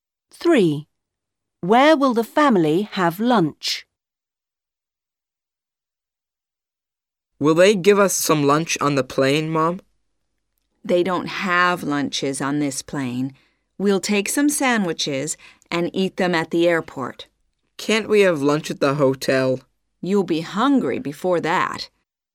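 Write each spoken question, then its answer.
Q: Where will the family have lunch?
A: at the airport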